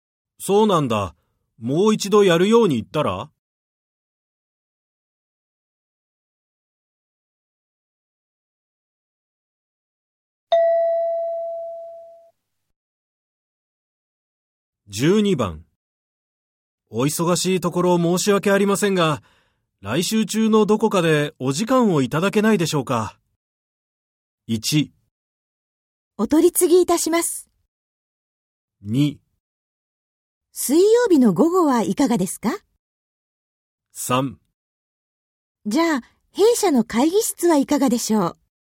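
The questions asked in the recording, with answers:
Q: お忙しいところ申し訳ありませんが、来週中のどこかでお時間をいただけないでしょうか。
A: 2: 水曜日の午後はいかがですか。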